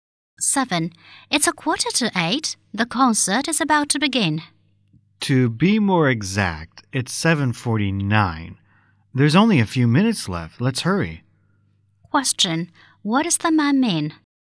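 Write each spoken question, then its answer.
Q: What does the man mean?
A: They must hurry; the concert starts in a few minutes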